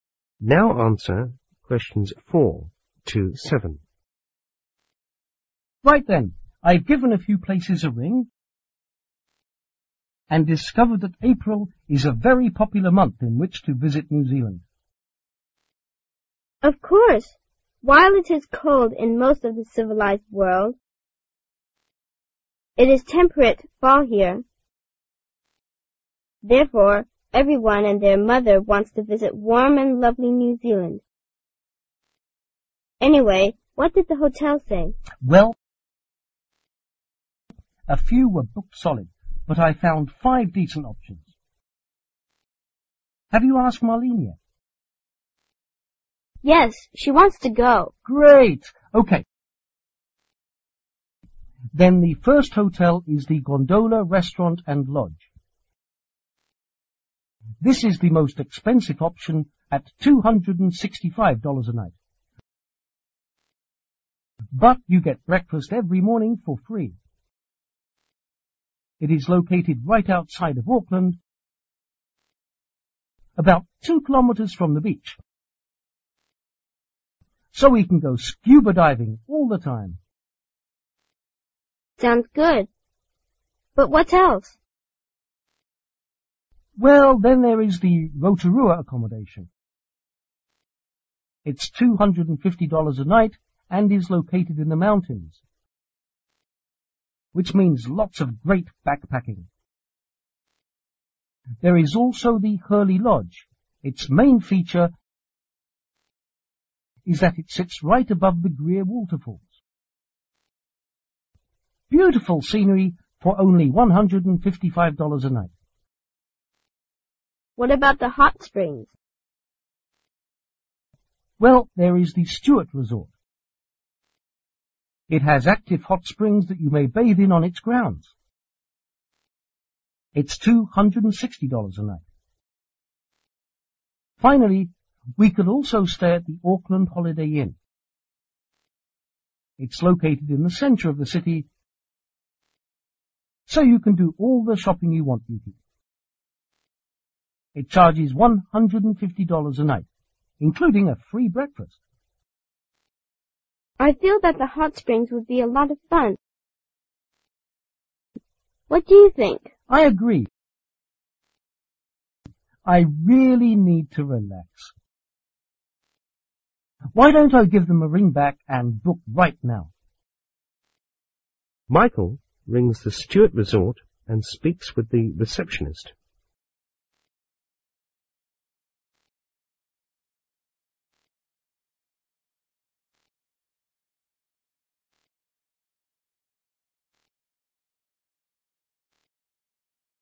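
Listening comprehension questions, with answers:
Complete the table with information about the different hotels' rates and features.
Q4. What is the main attraction in Rotorua Accommodation?( )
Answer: great backpacking

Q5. What's the rate per night In Herley Lodge?( )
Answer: 155 dollars

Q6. What is the main attraction in Stuart Resort?( )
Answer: active hot springs

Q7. What is the main attraction in Aucklanf Holiday Inn?( )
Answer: shopping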